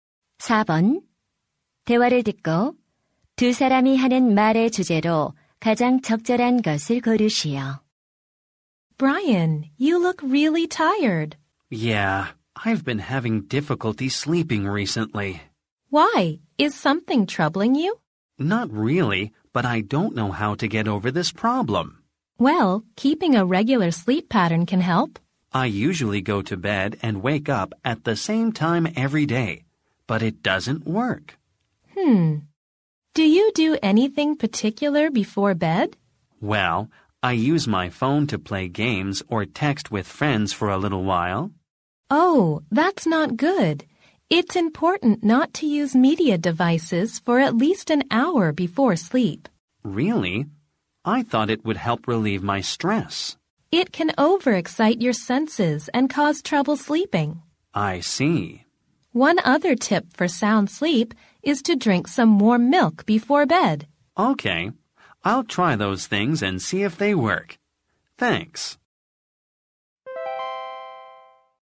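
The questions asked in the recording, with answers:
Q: 대화를 듣고 두 사람이 하는 말의 주제로 가장 적절한 것을 고르시오.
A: 숙면을 위한 방법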